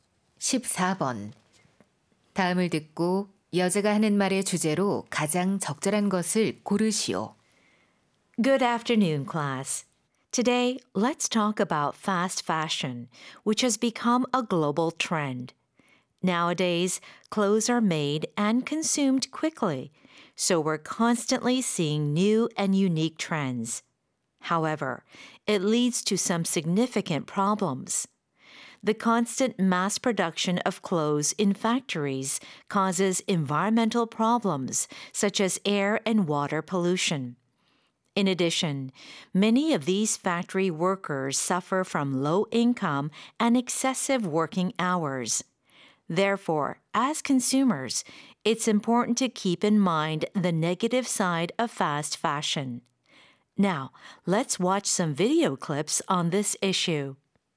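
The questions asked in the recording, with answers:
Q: 다음을 듣고 여자가 하는 말의 주제로 가장 적절한 것을 고르시오.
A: 패스트 패션의 부정적인 측면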